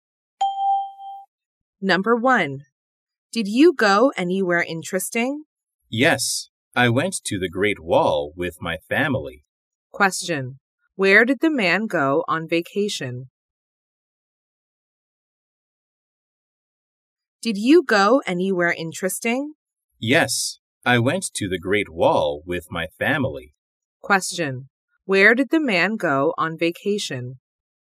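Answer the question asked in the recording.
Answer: To the Great Wall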